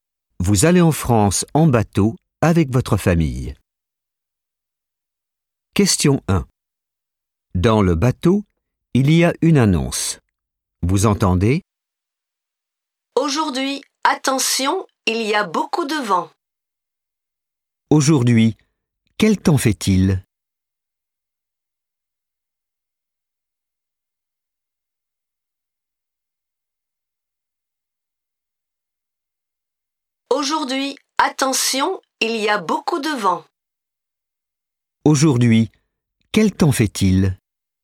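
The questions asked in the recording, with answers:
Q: Aujourd'hui, quel temps fait-il ?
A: Il y a beaucoup de vent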